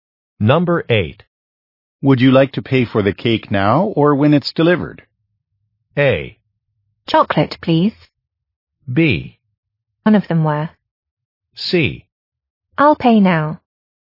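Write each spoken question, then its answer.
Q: Would you like to pay for the cake now or when it's delivered?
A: C: I'll pay now.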